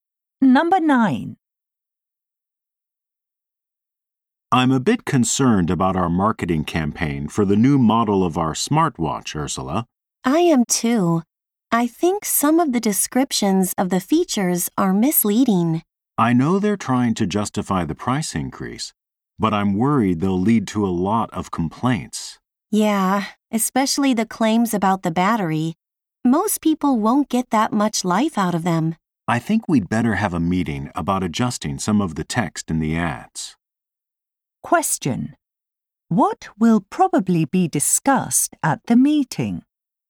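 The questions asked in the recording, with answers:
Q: What will probably be discussed at the meeting?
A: Changing misleading text in the ads, such as the battery claims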